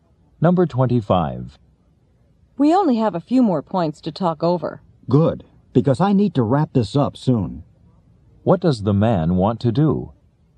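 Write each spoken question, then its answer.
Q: What does the man want to do?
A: Finish the discussion soon.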